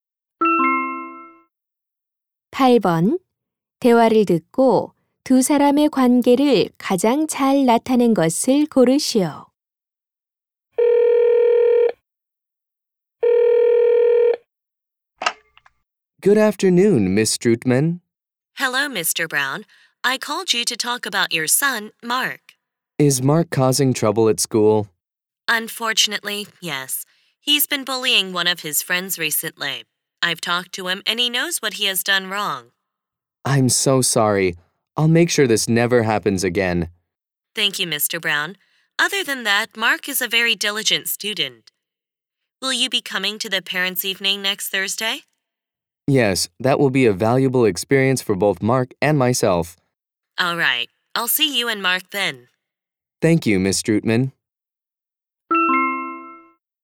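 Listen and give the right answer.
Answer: 교사와 학부모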